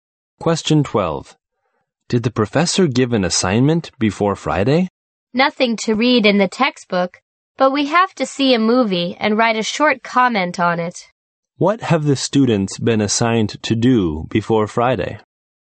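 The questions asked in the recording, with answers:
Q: What have the students been assigned to do before Friday?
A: See a movie and write a short comment on it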